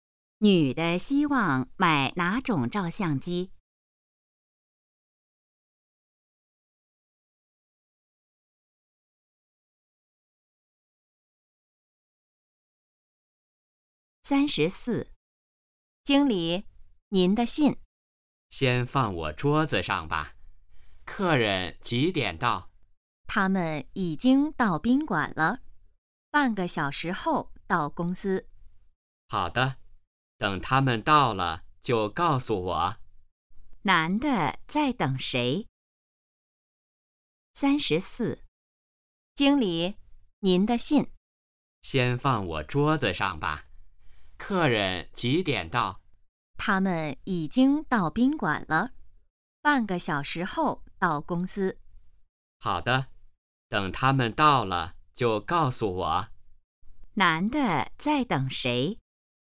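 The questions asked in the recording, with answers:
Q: 男的在等谁?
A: 客人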